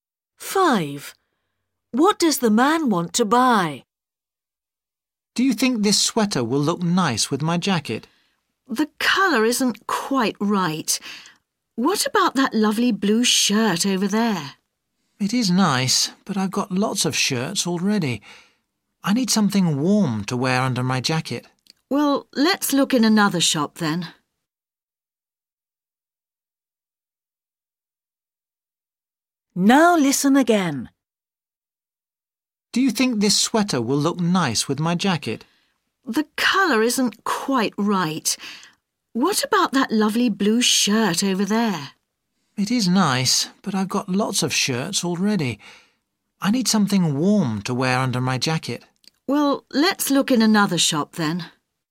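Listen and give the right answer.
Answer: a sweater (something warm to wear under his jacket)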